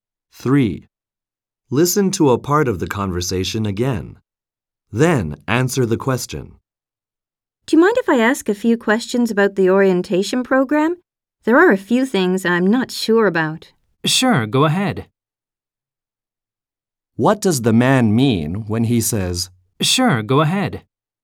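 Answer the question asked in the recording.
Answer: He is willing to answer her questions.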